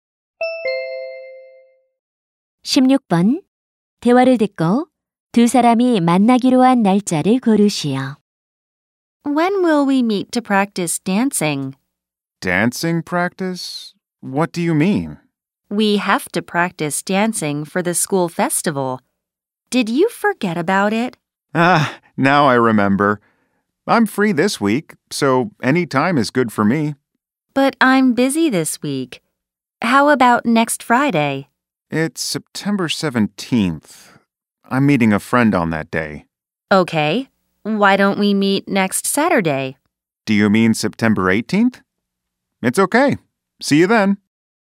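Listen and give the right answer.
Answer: 9월 18일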